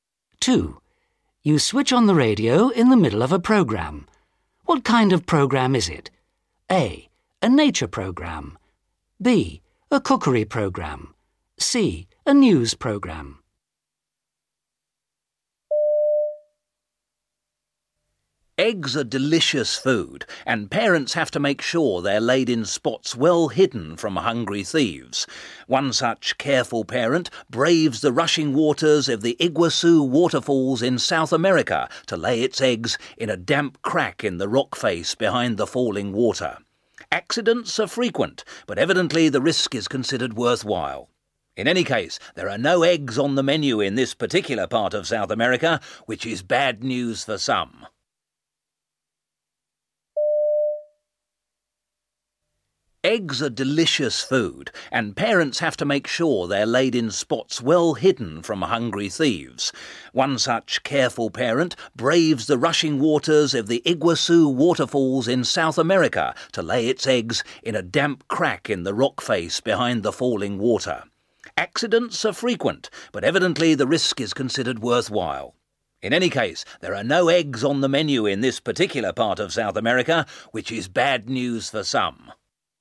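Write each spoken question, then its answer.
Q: What kind of programme is it?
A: A: A nature programme.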